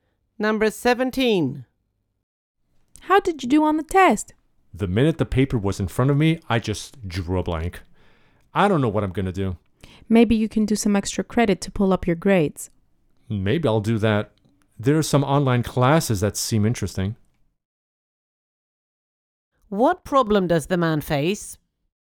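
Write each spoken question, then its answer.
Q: What problem does the man face?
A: He did badly on the test after drawing a blank.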